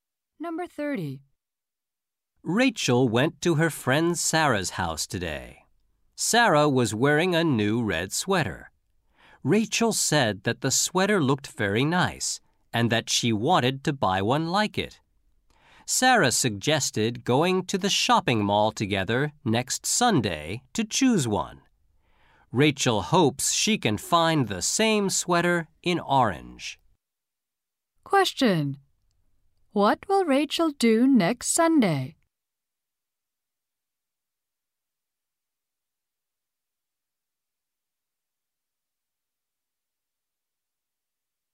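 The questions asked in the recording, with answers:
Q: What will Rachel do next Sunday?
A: Go to the shopping mall with Sarah to choose a sweater.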